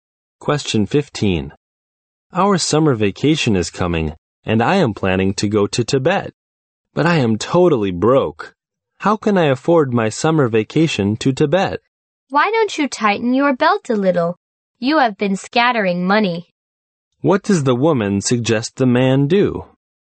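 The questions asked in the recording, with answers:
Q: What does the woman suggest the man do?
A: Spend less money and save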